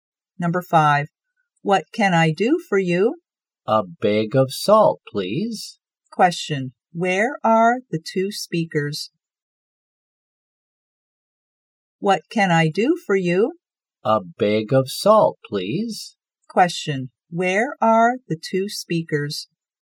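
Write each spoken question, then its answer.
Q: where are the two speakers?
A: In a shop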